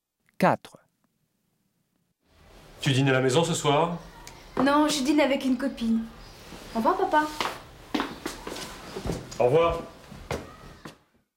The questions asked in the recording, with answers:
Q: Tu dînes à la maison ce soir?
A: 4, B